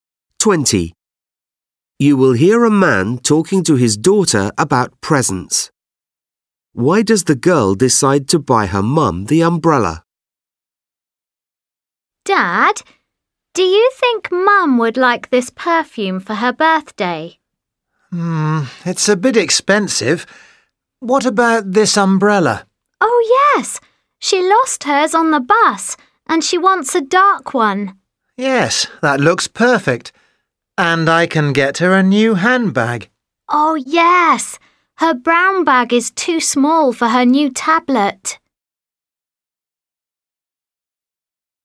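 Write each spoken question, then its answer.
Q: Why does the girl decide to buy her mum the umbrella?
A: Her mum lost hers on the bus and wants a dark one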